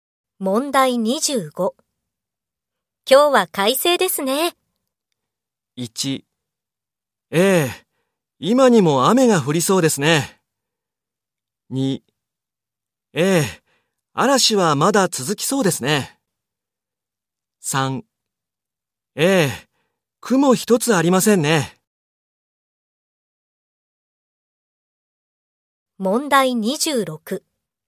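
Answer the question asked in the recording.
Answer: 3: ええ、雲一つありませんね。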